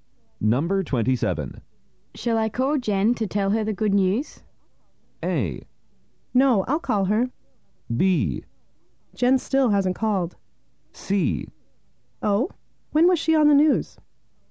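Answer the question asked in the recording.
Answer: A: No, I'll call her.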